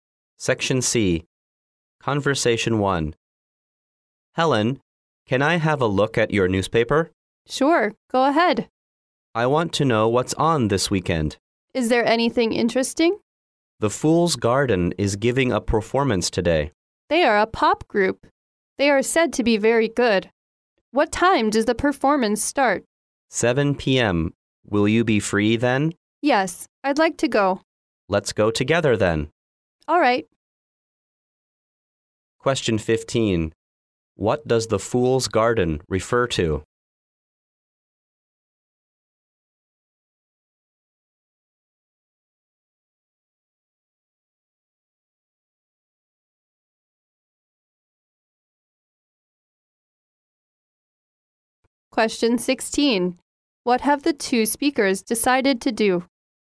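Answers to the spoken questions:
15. A pop group.
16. Go to the performance together.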